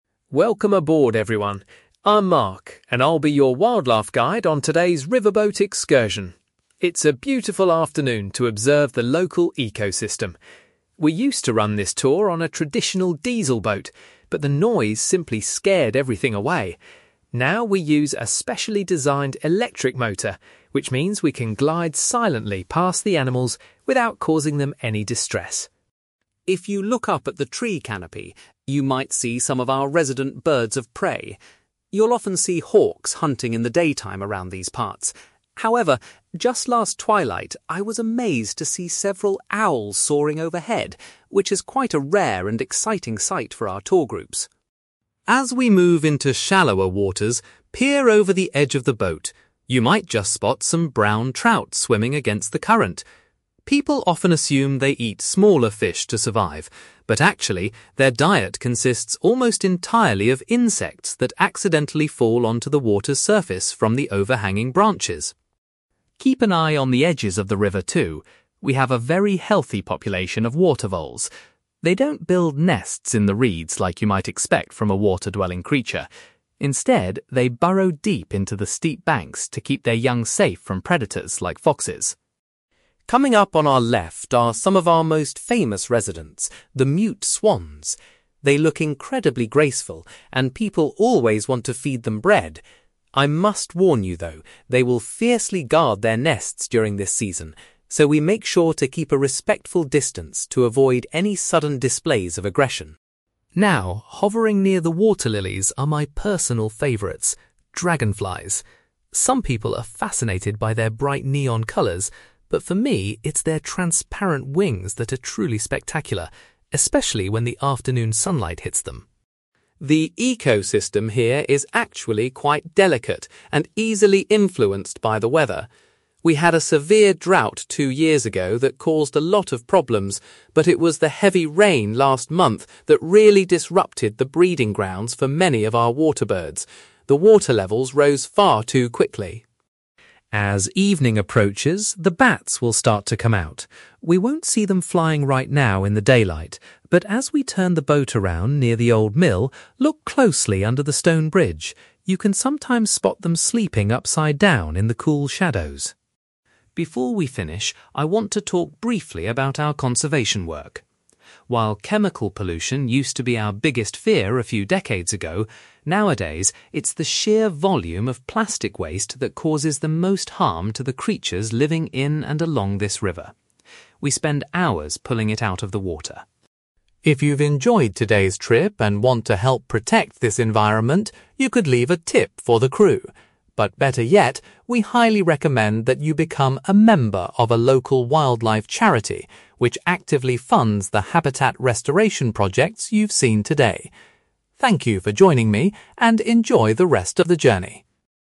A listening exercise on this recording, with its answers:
You will hear a wildlife guide called Mark giving a talk to passengers on a riverboat excursion. For questions 9-18, complete the sentences with a word or short phrase.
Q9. Mark explains that the boat's (9)........................... allows them to approach animals without frightening them.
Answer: electric motor

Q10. Mark was thrilled when he recently spotted some (10)........................... flying above the boat.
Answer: owls

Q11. Mark mentions that the brown trout in the river primarily feed on (11)........................... .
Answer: insects

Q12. According to Mark, water voles build their homes in the (12)........................... of the river.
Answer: steep banks

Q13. Mark warns passengers that swans can be aggressive when protecting their (13)........................... .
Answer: nests

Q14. Mark is always fascinated by the beautiful (14)........................... of the dragonflies.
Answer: wings

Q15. Mark explains that the river's wildlife was recently affected by a period of (15)........................... .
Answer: heavy rain

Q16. Visitors might be able to see bats resting underneath a (16)........................... as the boat turns around.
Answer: bridge

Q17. Mark highlights the ongoing problem of (17)........................... in the local environment.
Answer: plastic waste

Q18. Mark suggests that passengers can support conservation by joining a (18)........................... .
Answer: wildlife charity

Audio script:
Mark: Welcome aboard, everyone! I'm Mark, and I'll be your wildlife guide on today's riverboat excursion. It's a beautiful afternoon to observe the local ecosystem. We used to run this tour on a traditional diesel boat, but the noise simply scared everything away. Now, we use a specially designed electric motor, which means we can glide silently past the animals without causing them any distress.
If you look up at the tree canopy, you might see some of our resident birds of prey. You'll often see hawks hunting in the daytime around these parts. However, just last twilight, I was amazed to see several owls soaring overhead, which is quite a rare and exciting sight for our tour groups.
As we move into shallower waters, peer over the edge of the boat. You might just spot some brown trout swimming against the current. People often assume they eat smaller fish to survive, but actually, their diet consists almost entirely of insects that accidentally fall onto the water's surface from the overhanging branches.
Keep an eye on the edges of the river, too. We have a very healthy population of water voles. They don't build nests in the reeds like you might expect from a water-dwelling creature. Instead, they burrow deep into the steep banks to keep their young safe from predators like foxes.
Coming up on our left are some of our most famous residents: the mute swans. They look incredibly graceful, and people always want to feed them bread. I must warn you, though, they will fiercely guard their nests during this season. So, we make sure to keep a respectful distance to avoid any sudden displays of aggression.
Now, hovering near the water lilies are my personal favorites: dragonflies. Some people are fascinated by their bright neon colors, but for me, it's their transparent wings that are truly spectacular, especially when the afternoon sunlight hits them.
The ecosystem here is actually quite delicate and easily influenced by the weather. We had a severe drought two years ago that caused a lot of problems, but it was the heavy rain last month that really disrupted the breeding grounds for many of our water birds. The water levels rose far too quickly.
As evening approaches, the bats will start to come out. We won't see them flying right now in the daylight, but as we turn the boat around near the old mill, look closely under the stone bridge. You can sometimes spot them sleeping upside down in the cool shadows.
Before we finish, I want to talk briefly about our conservation work. While chemical pollution used to be our biggest fear a few decades ago, nowadays, it's the sheer volume of plastic waste that causes the most harm to the creatures living in and along this river. We spend hours pulling it out of the water.
If you've enjoyed today's trip and want to help protect this environment, you could leave a tip for the crew. But better yet, we highly recommend that you become a member of a local wildlife charity, which actively funds the habitat restoration projects you've seen today. Thank you for joining me, and enjoy the rest of the journey!

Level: B2